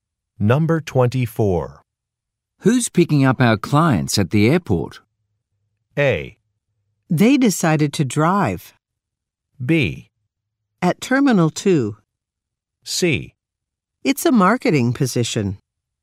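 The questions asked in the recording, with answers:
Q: Who's picking up our clients at the airport?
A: A: They decided to drive.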